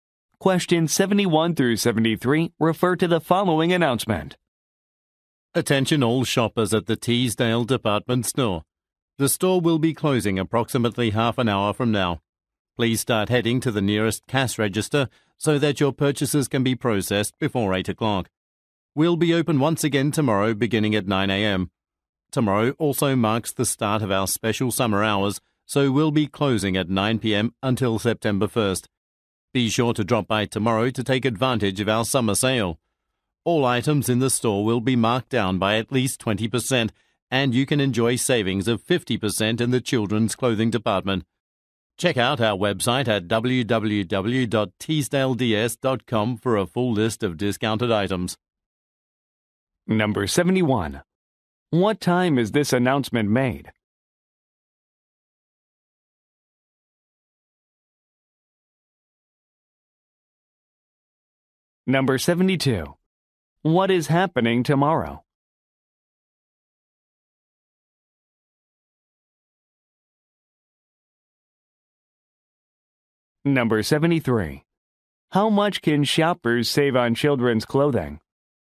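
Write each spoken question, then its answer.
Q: What time is this announcement made?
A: About 7:30 p.m.

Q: What is happening tomorrow?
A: Summer hours and a summer sale begin

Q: How much can shoppers save on children's clothing?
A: 50%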